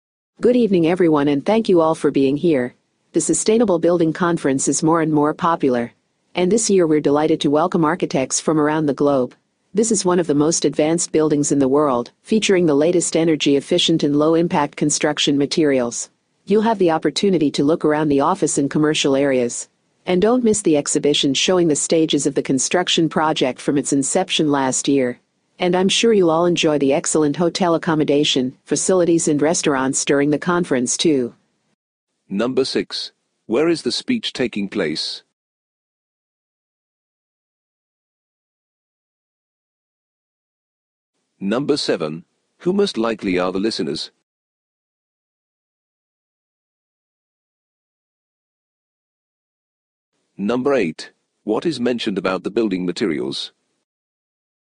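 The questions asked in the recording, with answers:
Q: Who most likely are the listeners?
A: Architects

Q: What is mentioned about the building materials?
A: They are the latest energy-efficient, low-impact materials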